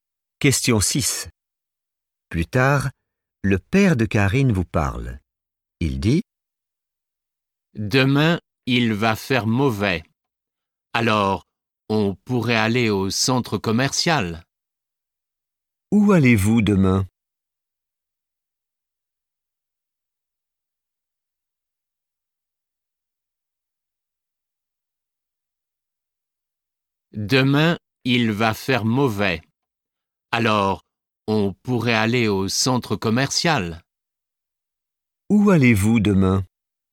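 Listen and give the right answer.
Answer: au centre commercial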